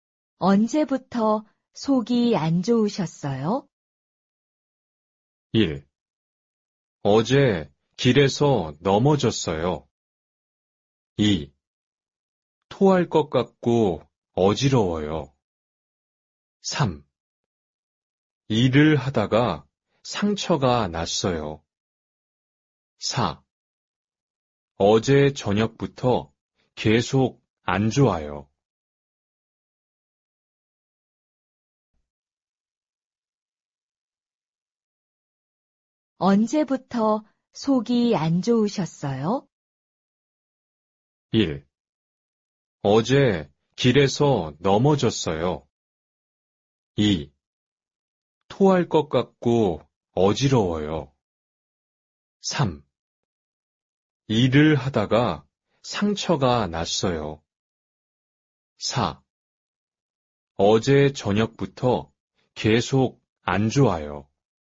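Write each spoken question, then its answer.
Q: 언제부터 속이 안 좋으셨어요?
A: 4: 어제 저녁부터 계속 안 좋아요.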